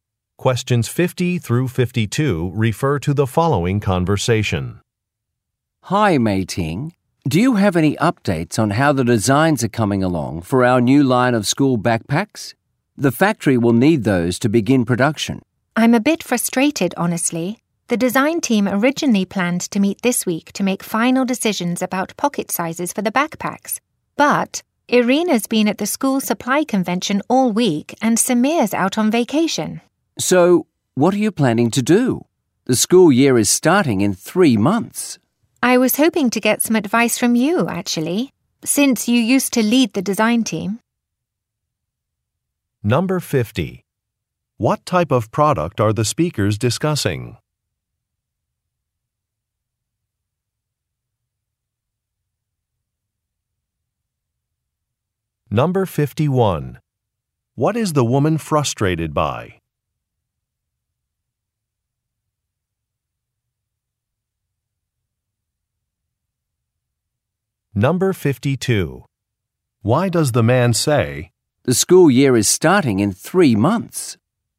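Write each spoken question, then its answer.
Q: What type of product are the speakers discussing?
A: School backpacks

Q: What is the woman frustrated by?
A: Team members are unavailable to meet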